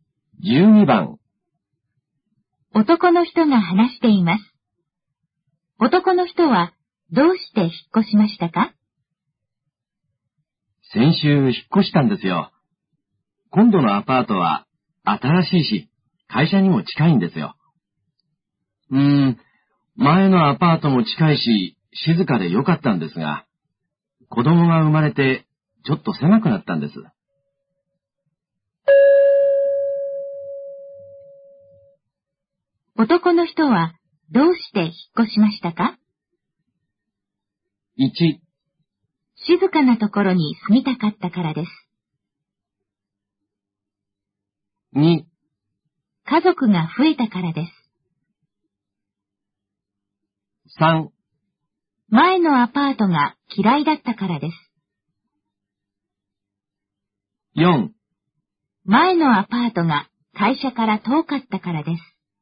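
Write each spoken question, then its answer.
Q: 男の人はどうして引っ越しましたか?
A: 2: 家族が増えたからです。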